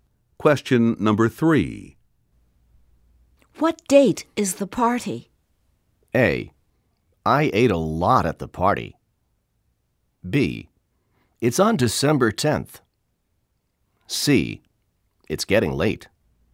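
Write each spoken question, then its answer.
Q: What date is the party?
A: B: It's on December 10th.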